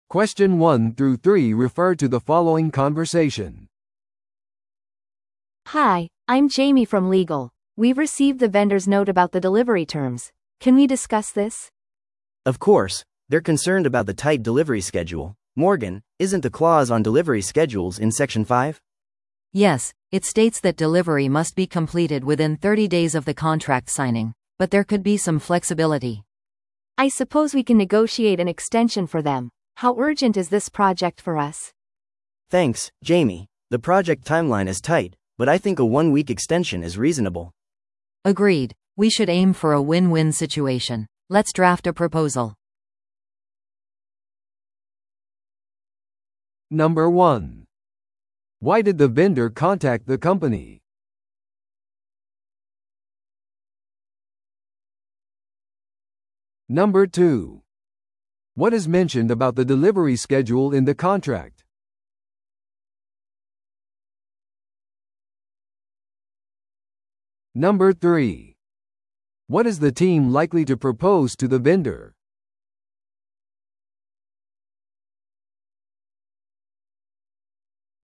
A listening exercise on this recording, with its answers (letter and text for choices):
Listen to the audio below and answer the questions.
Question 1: Why did the vendor contact the company?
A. 契約を承認するため。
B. 延長を要求するため。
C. 配達条件についての懸念を表明するため。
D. プロジェクトのタイムラインを交渉するため。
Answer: C. 配達条件についての懸念を表明するため。

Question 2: What is mentioned about the delivery schedule in the contract?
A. 配達は即座でなければならない。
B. 配達はいつでもスケジュールできる。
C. 契約締結から30日以内に配達をする必要がある。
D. 配達条件は指定されていない。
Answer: C. 契約締結から30日以内に配達をする必要がある。

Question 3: What is the team likely to propose to the vendor?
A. 契約のキャンセル。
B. 配達スケジュールの延長。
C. プロジェクトの緊急性の軽減。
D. 変更なしの双方にとって良い状況。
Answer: B. 配達スケジュールの延長。

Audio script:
A: Hi, I'm Jamie from legal. We've received the vendor's note about the delivery terms. Can we discuss this?
B: Of course. They're concerned about the tight delivery schedule. Morgan, isn't the clause on delivery schedules in section 5?
C: Yes, it states that delivery must be completed within 30 days of the contract signing, but there could be some flexibility.
A: I suppose we can negotiate an extension for them. How urgent is this project for us?
B: Thanks, Jamie. The project timeline is tight, but I think a one-week extension is reasonable.
C: Agreed. We should aim for a win-win situation. Let's draft a proposal.